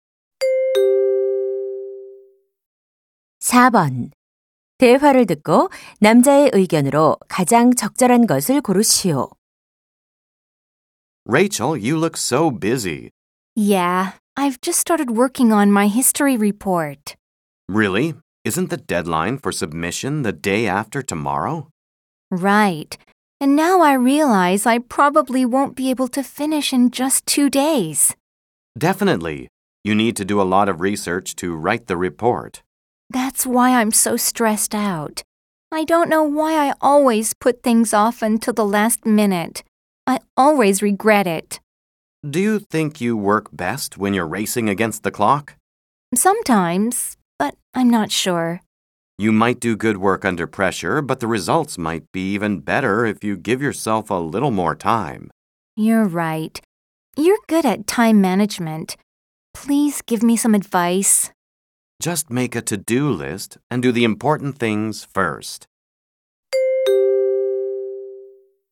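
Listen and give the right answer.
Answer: 일을 미루지 말고 시간 여유를 두고 미리 해야 한다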